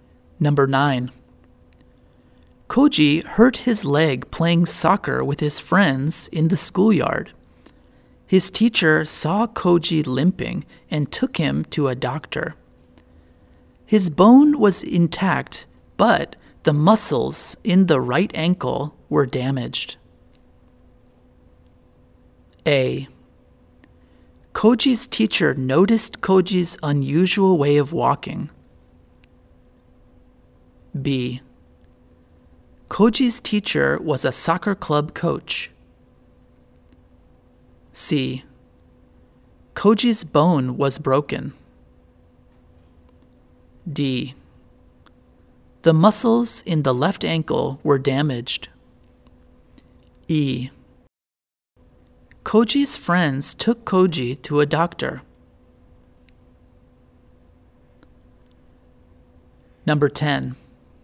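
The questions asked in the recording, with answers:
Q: Koji hurt his leg playing soccer with his friends in the schoolyard.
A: A: Koji's teacher noticed Koji's unusual way of walking.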